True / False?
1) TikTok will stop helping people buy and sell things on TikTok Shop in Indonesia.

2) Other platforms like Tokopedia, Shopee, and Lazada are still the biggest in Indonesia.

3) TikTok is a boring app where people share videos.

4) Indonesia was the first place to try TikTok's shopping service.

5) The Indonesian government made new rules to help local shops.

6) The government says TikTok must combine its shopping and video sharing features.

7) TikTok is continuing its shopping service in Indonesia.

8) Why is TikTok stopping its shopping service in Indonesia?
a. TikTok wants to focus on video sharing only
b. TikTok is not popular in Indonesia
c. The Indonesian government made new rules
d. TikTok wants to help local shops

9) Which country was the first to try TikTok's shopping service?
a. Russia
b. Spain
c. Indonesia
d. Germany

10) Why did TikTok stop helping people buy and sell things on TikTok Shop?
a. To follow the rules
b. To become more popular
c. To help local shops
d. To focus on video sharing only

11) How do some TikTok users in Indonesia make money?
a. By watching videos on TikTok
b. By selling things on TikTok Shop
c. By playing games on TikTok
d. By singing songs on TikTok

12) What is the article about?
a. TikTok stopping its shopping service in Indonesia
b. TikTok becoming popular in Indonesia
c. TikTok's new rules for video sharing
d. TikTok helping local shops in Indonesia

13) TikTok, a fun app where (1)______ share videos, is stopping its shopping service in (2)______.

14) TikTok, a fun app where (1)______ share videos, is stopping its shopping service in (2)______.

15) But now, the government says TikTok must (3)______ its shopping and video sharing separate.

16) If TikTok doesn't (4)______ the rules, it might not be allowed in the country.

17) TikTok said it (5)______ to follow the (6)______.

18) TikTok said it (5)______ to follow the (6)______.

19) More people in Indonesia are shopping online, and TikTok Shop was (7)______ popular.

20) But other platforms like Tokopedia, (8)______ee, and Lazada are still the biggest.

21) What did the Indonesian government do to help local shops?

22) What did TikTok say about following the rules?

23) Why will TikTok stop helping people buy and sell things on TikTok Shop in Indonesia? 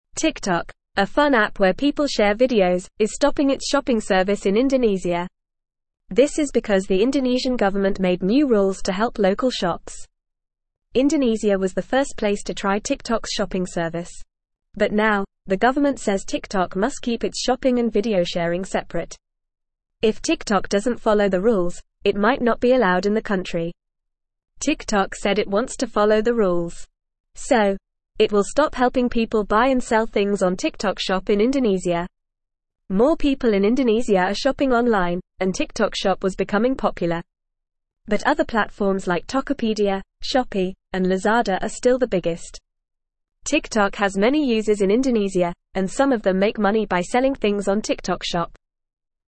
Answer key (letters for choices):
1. True
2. True
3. False
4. True
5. True
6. False
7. False
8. c
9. c
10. a
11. b
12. a
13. people
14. Indonesia
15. keep
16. follow
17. wants
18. rules
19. becoming
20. Shop
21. The Indonesian government made new rules that require TikTok to keep its shopping and video sharing separate to help local shops.
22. TikTok said it wants to follow the rules.
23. TikTok will stop helping people buy and sell things on TikTok Shop in Indonesia to follow the new rules set by the government.

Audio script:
TikTok, a fun app where people share videos, is stopping its shopping service in Indonesia. This is because the Indonesian government made new rules to help local shops. But now, the government says TikTok must keep its shopping and video sharing separate. If TikTok doesn't follow the rules, it might not be allowed in the country.
TikTok said it wants to follow the rules. So, it will stop helping people buy and sell things on TikTok Shop in Indonesia. More people in Indonesia are shopping online, and TikTok Shop was becoming popular. But other platforms like Tokopedia, Shopee, and Lazada are still the biggest. TikTok has many users in Indonesia, and some of them make money by selling things on TikTok Shop.

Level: Level 1